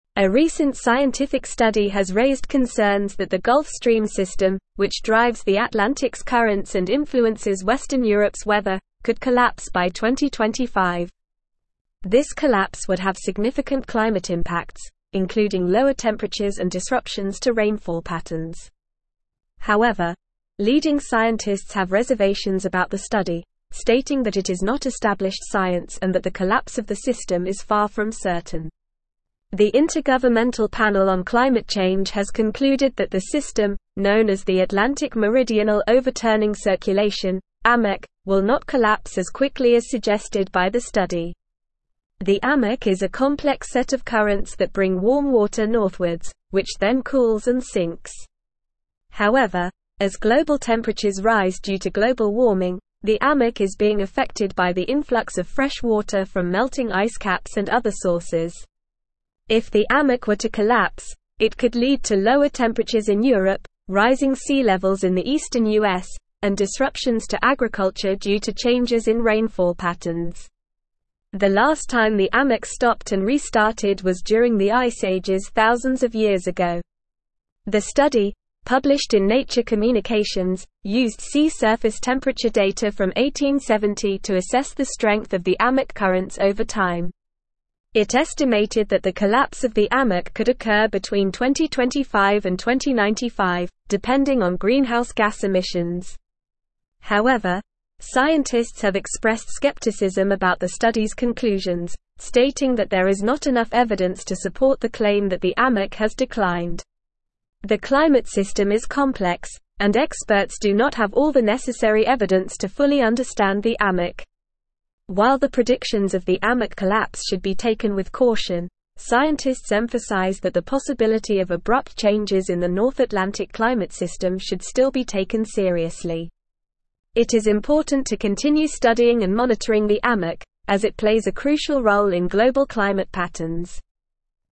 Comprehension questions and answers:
Listen and Fill in the Gaps:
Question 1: A recent scientific study has raised (1)______ that the Gulf Stream system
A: concerns

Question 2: which drives the Atlantic's (2)______ and influences western Europe's weather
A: currents

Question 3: including (3)______ temperatures and disruptions to rainfall patterns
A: lower

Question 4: The (4)______ Panel on Climate Change has concluded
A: Intergovernmental

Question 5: will not collapse as quickly as (5)______ by the study.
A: suggested

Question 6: the Amoc is being affected by the (6)______ of fresh water from melting ice caps and other (7)______.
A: influx

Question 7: the Amoc is being affected by the (6)______ of fresh water from melting ice caps and other (7)______.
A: sources

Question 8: rising sea (8)______ in the eastern US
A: levels

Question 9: disruptions to agriculture due to (9)______ in rainfall patterns.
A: changes

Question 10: during the Ice Ages thousands of (10)______ ago.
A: years

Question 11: used sea surface temperature data from 1870 to (11)______ the strength of the Amoc currents over time.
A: assess

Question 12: It estimated that the (12)______ of the Amoc could occur between 2025 and 2095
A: collapse

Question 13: The climate (13)______ is complex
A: system

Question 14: scientists (14)______ that the possibility of abrupt changes in the North (15)______ climate system should still be taken seriously.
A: emphasize

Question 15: scientists (14)______ that the possibility of abrupt changes in the North (15)______ climate system should still be taken seriously.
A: Atlantic

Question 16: It is important to continue (16)______ and monitoring the Amoc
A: studying

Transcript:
A recent scientific study has raised concerns that the Gulf Stream system, which drives the Atlantic's currents and influences western Europe's weather, could collapse by 2025. This collapse would have significant climate impacts, including lower temperatures and disruptions to rainfall patterns. However, leading scientists have reservations about the study, stating that it is not established science and that the collapse of the system is far from certain. The Intergovernmental Panel on Climate Change has concluded that the system, known as the Atlantic Meridional Overturning Circulation (Amoc), will not collapse as quickly as suggested by the study.
The Amoc is a complex set of currents that bring warm water northwards, which then cools and sinks. However, as global temperatures rise due to global warming, the Amoc is being affected by the influx of fresh water from melting ice caps and other sources. If the Amoc were to collapse, it could lead to lower temperatures in Europe, rising sea levels in the eastern US, and disruptions to agriculture due to changes in rainfall patterns. The last time the Amoc stopped and restarted was during the Ice Ages thousands of years ago.
The study, published in Nature Communications, used sea surface temperature data from 1870 to assess the strength of the Amoc currents over time. It estimated that the collapse of the Amoc could occur between 2025 and 2095, depending on greenhouse gas emissions. However, scientists have expressed skepticism about the study's conclusions, stating that there is not enough evidence to support the claim that the Amoc has declined. The climate system is complex, and experts do not have all the necessary evidence to fully understand the Amoc.
While the predictions of the Amoc collapse should be taken with caution, scientists emphasize that the possibility of abrupt changes in the North Atlantic climate system should still be taken seriously. It is important to continue studying and monitoring the Amoc, as it plays a crucial role in global climate patterns.

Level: Level 4